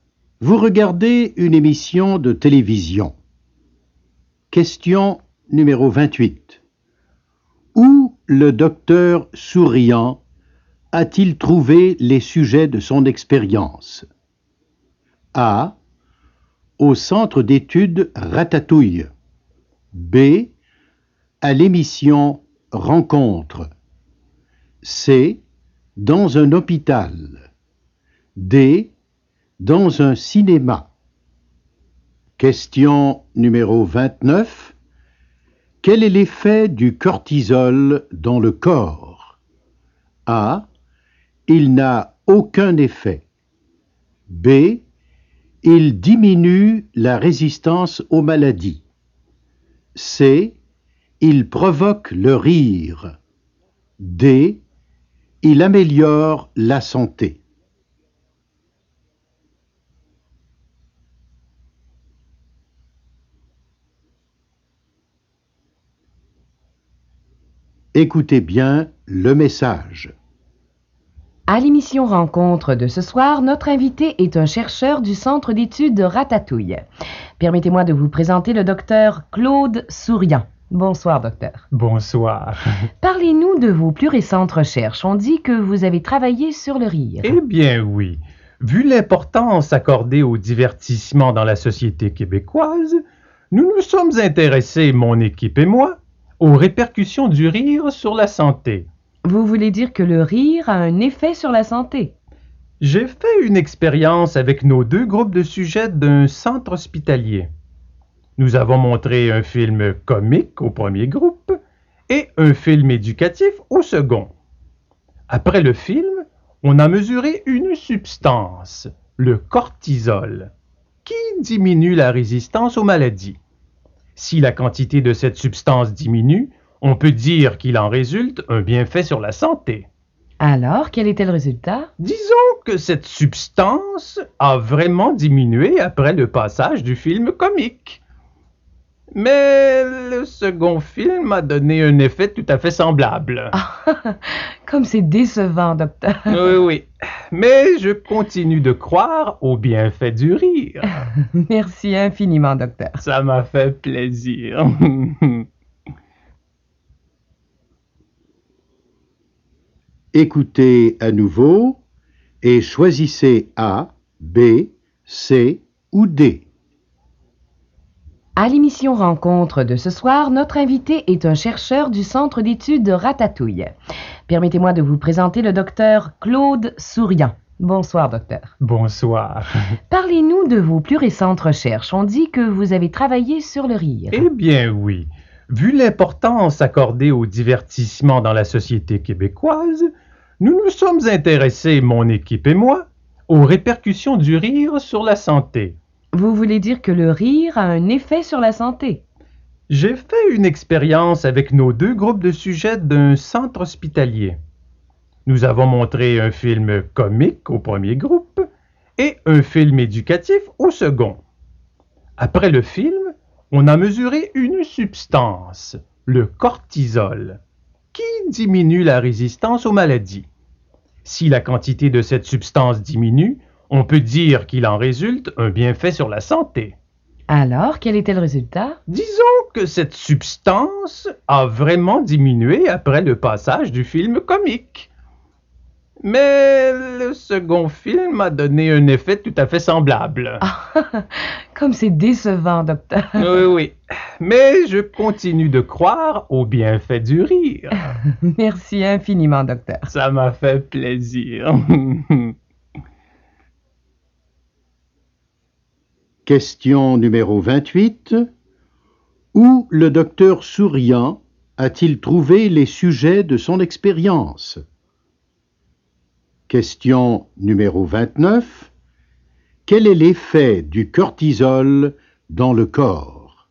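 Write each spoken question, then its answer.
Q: Où le docteur Souriant a-t-il trouvé les sujets de son expérience?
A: C: Dans un hôpital.

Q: Quel est l'effet du cortisol dans le corps?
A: B: Il diminue la résistance aux maladies.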